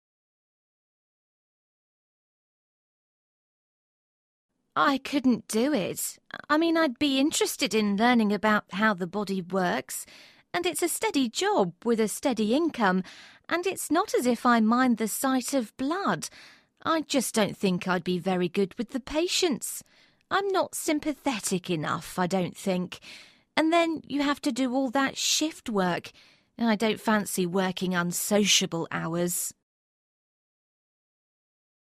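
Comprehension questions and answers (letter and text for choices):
What profession is the woman talking about?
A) dentist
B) nurse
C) police officer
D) teacher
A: B) nurse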